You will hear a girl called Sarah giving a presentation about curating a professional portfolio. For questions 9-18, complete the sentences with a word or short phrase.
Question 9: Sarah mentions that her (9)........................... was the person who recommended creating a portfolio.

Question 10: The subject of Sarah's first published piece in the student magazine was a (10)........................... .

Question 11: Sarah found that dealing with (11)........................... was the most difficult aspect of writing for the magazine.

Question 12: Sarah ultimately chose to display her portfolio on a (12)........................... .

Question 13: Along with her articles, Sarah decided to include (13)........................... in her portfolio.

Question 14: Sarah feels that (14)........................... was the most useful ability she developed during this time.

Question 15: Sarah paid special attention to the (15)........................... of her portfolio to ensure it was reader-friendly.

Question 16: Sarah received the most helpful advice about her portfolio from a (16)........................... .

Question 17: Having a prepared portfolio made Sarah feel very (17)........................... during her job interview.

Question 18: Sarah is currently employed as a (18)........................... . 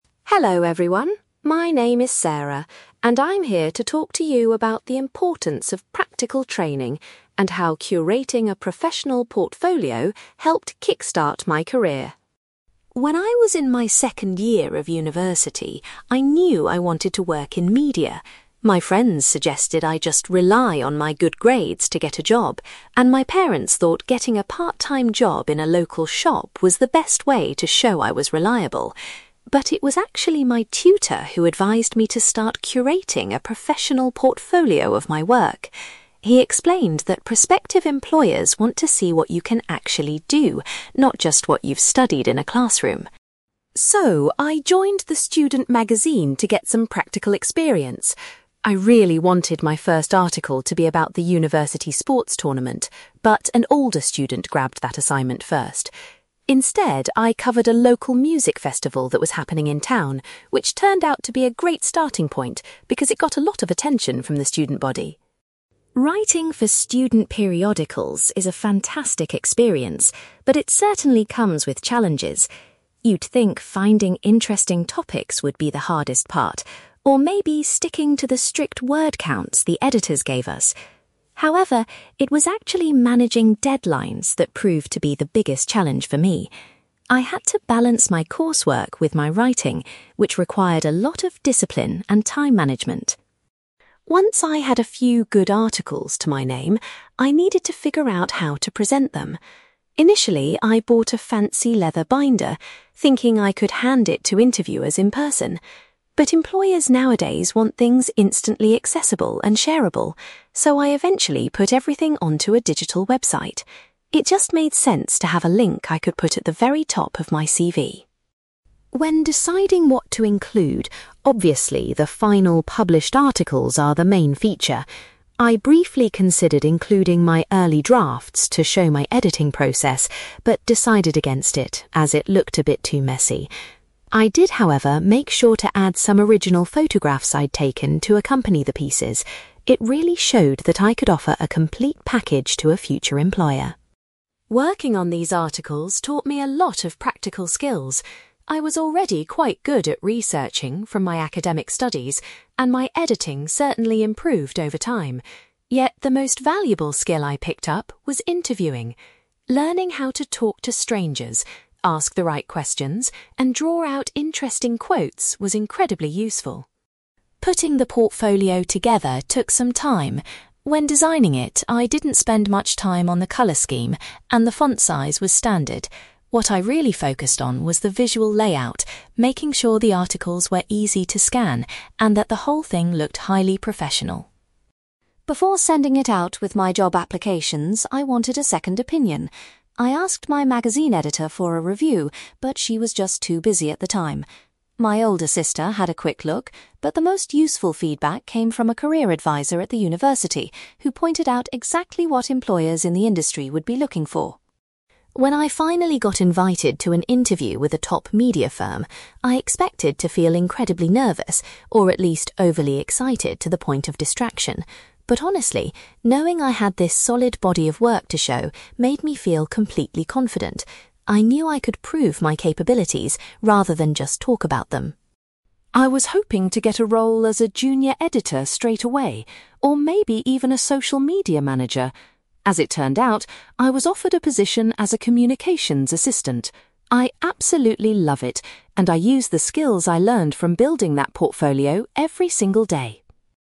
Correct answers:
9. tutor
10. music festival
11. deadlines
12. digital website
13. original photographs
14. interviewing
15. visual layout
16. career advisor
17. confident
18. communications assistant

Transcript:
Sarah: Hello everyone, my name is Sarah, and I'm here to talk to you about the importance of practical training and how curating a professional portfolio helped kickstart my career.
When I was in my second year of university, I knew I wanted to work in media. My friends suggested I just rely on my good grades to get a job, and my parents thought getting a part-time job in a local shop was the best way to show I was reliable. But it was actually my tutor who advised me to start curating a professional portfolio of my work. He explained that prospective employers want to see what you can actually do, not just what you've studied in a classroom.
So, I joined the student magazine to get some practical experience. I really wanted my first article to be about the university sports tournament, but an older student grabbed that assignment first. Instead, I covered a local music festival that was happening in town, which turned out to be a great starting point because it got a lot of attention from the student body.
Writing for student periodicals is a fantastic experience, but it certainly comes with challenges. You'd think finding interesting topics would be the hardest part, or maybe sticking to the strict word counts the editors gave us. However, it was actually managing deadlines that proved to be the biggest challenge for me. I had to balance my coursework with my writing, which required a lot of discipline and time management.
Once I had a few good articles to my name, I needed to figure out how to present them. Initially, I bought a fancy leather binder, thinking I could hand it to interviewers in person. But employers nowadays want things instantly accessible and shareable, so I eventually put everything onto a digital website. It just made sense to have a link I could put at the very top of my CV.
When deciding what to include, obviously, the final published articles are the main feature. I briefly considered including my early drafts to show my editing process, but decided against it as it looked a bit too messy. I did, however, make sure to add some original photographs I'd taken to accompany the pieces. It really showed that I could offer a complete package to a future employer.
Working on these articles taught me a lot of practical skills. I was already quite good at researching from my academic studies, and my editing certainly improved over time. Yet, the most valuable skill I picked up was interviewing. Learning how to talk to strangers, ask the right questions, and draw out interesting quotes was incredibly useful.
Putting the portfolio together took some time. When designing it, I didn't spend much time on the color scheme, and the font size was standard. What I really focused on was the visual layout, making sure the articles were easy to scan and that the whole thing looked highly professional.
Before sending it out with my job applications, I wanted a second opinion. I asked my magazine editor for a review, but she was just too busy at the time. My older sister had a quick look, but the most useful feedback came from a career advisor at the university, who pointed out exactly what employers in the industry would be looking for.
When I finally got invited to an interview with a top media firm, I expected to feel incredibly nervous, or at least overly excited to the point of distraction. But honestly, knowing I had this solid body of work to show made me feel completely confident. I knew I could prove my capabilities rather than just talk about them.
I was hoping to get a role as a junior editor straight away, or maybe even a social media manager. As it turned out, I was offered a position as a communications assistant. I absolutely love it, and I use the skills I learned from building that portfolio every single day.

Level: B2